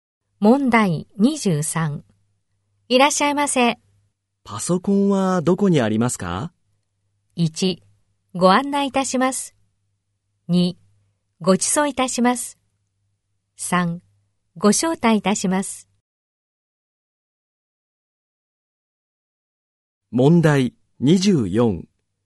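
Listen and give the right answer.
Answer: 1: ご案内いたします。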